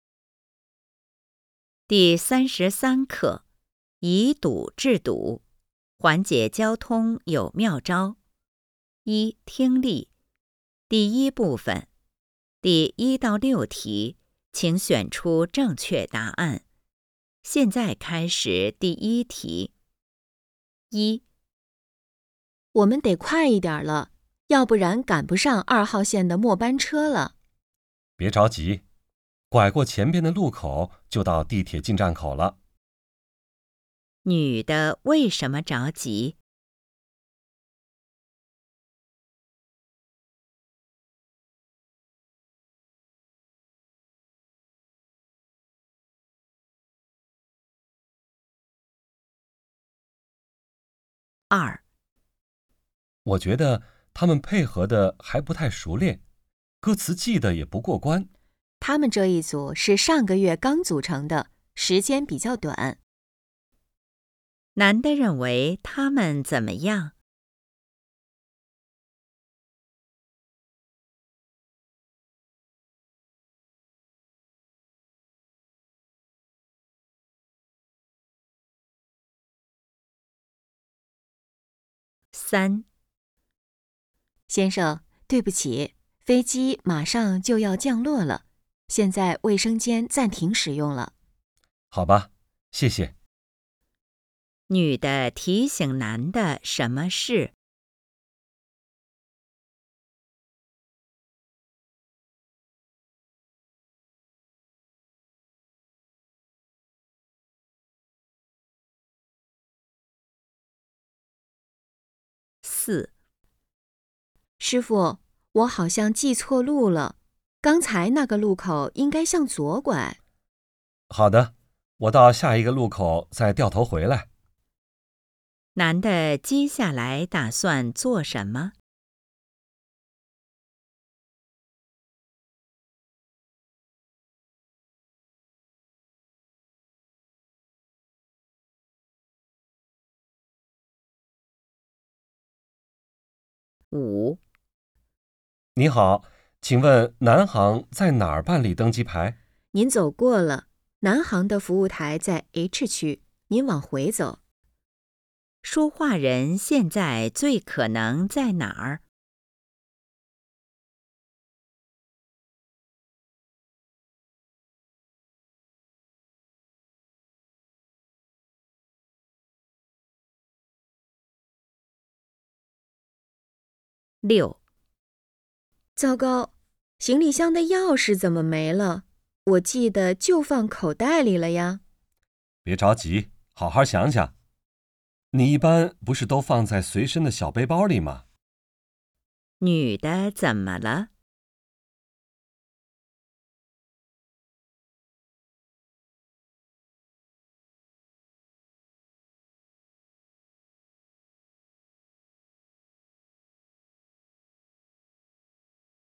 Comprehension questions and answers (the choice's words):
第1-6题:请选择正确答案。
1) 女的为什么着急?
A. 坐错了线路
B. 打不到出租车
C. 怕错过末班车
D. 找不到地铁入口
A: 怕错过末班车

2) 男的认为他们怎么样?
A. 配合不理想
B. 动作不优美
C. 歌词很熟练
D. 表演很精彩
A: 配合不理想

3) 女的提醒男的什么事?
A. 系好安全带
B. 不能上厕所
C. 出示登机牌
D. 调整好座椅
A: 不能上厕所

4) 男的接下来打算做什么?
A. 下车问路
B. 调头回去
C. 靠边停车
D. 在路口左拐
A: 调头回去

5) 说话人现在最可能在哪儿?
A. 银行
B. 商店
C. 机场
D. 火车站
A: 机场

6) 女的怎么了?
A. 忘了箱子密码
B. 行李箱超重了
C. 钥匙找不到了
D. 出来忘锁门了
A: 钥匙找不到了

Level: HSK 5